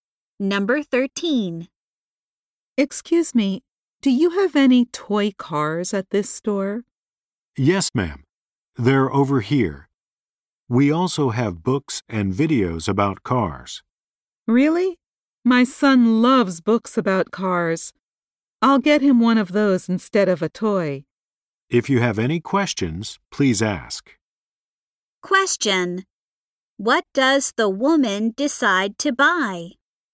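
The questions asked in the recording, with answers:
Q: What does the woman decide to buy?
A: A book about cars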